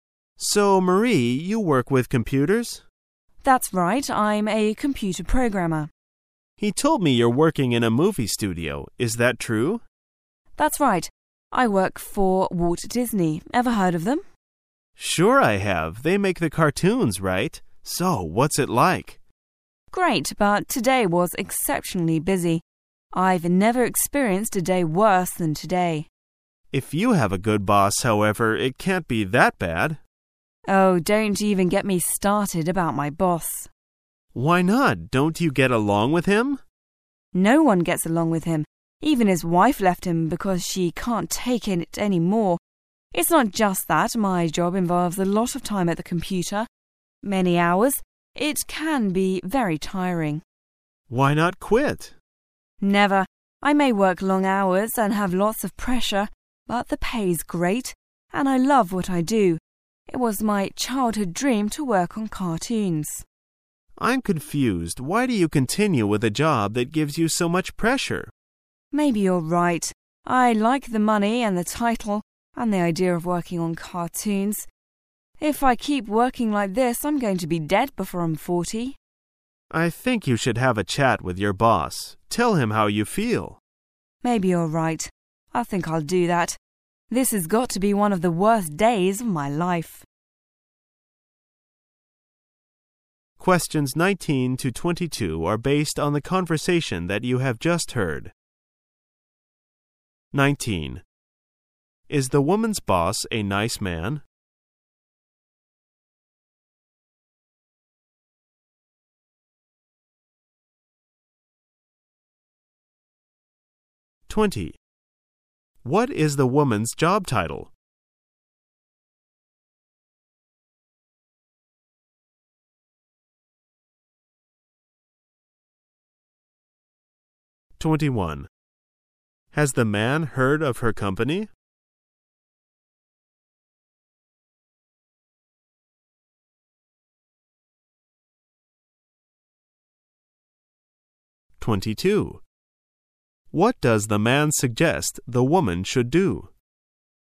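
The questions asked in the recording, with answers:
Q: Is the woman's boss a nice man?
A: No, nobody gets along with him

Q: What is the woman's job title?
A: Computer programmer

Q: Has the man heard of her company?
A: Yes

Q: What does the man suggest the woman should do?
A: Talk to her boss and tell him how she feels

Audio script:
[解析] 19-22 M: So, Marie you work with computers? W: That's right. I'm a computer programmer. M: He told me you're working in a movie studio. Is that true? W: That's right. I work for Walt Disney. Ever heard of them? M: Sure I have! They make the cartoons, right? So, what's it like? W: Great, but today was exceptionally busy. I've never experienced a day worse than to day. M: If you have a good boss, however, it can't be that bad? W: Oh, don't even get me started about my boss! M: Why not? Don't you get along with him? W: No one gets along with him! Even his wife left him because she couldn't take it any more. 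It's not just that, my job involves a lot of time at the computer, many hours, it can be very tiring. M: Why not quit? W: Never! I may work long hours and have lots of pressure, but the pay's great and I love what I do. It was my childhood dream to work on cartoons. M: I'm confused. Why do you continue with a job that gives you so much pressure? W: Maybe you are right. I like the money and the title, and the idea of working on cartoons,. If I keep working like this I'm going to be dead before I'm 40! M: I think you should have a chat with your boss, tell him how you feel. W: Maybe you are right. I think I'll do that. This has got to be one of the worst days. of my life !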